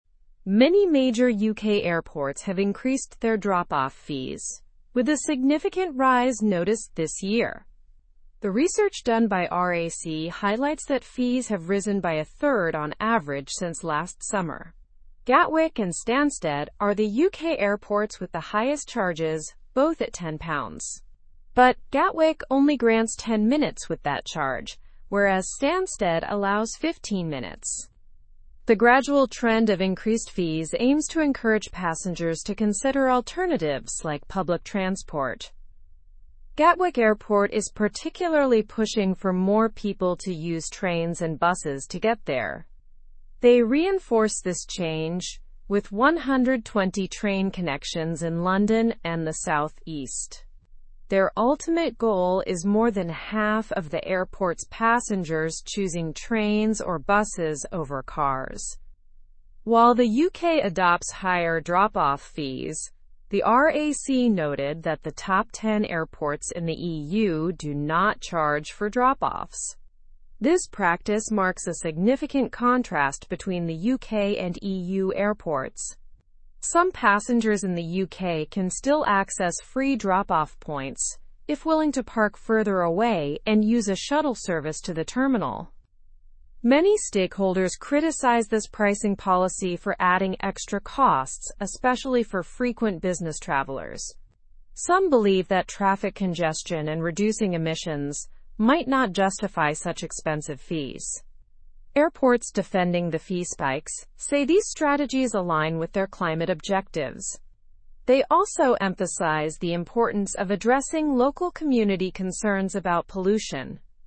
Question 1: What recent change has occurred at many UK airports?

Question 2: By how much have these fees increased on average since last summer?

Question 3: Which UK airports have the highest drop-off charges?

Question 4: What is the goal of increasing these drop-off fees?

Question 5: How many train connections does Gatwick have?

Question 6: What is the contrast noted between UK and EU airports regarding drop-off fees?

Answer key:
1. They have increased their drop-off fees.
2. They have risen by a third on average.
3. Gatwick and Stansted.
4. To encourage passengers to use public transport.
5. It has 120 train connections in London and the South East.
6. EU airports do not charge for drop-offs.

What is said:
Many major UK airports have increased their drop-off fees, with a significant rise noticed this year. The research done by RAC highlights that fees have risen by a third on average since last summer. Gatwick and Stansted are the UK airports with the highest charges, both at £10. But Gatwick only grants 10 minutes with that charge, whereas Stansted allows 15 minutes.
The gradual trend of increased fees aims to encourage passengers to consider alternatives like public transport. Gatwick Airport is particularly pushing for more people to use trains and buses to get there. They reinforce this change with 120 train connections in London and the South East. Their ultimate goal is more than half of the airport's passengers choosing trains or buses over cars.
While the UK adopts higher drop-off fees, the RAC noted that the top ten airports in the EU do not charge for drop-offs.
drop-off fees, the RAC noted that the top ten airports in the EU do not charge for drop-offs. This practice marks a significant ? between the UK and EU airports. Some passengers in the UK can still ? free drop-off points if ? to park further away and use a shuttle service to the terminal. Many stakeholders criticize this ? policy for adding extra costs, especially for ? business travelers. Some believe that traffic congestion and reducing emissions might not justify such ? fees. Airports defending the fee spikes say these strategies align with their climate objectives. They also emphasize the importance of addressing local community concerns about ?.

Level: Level 3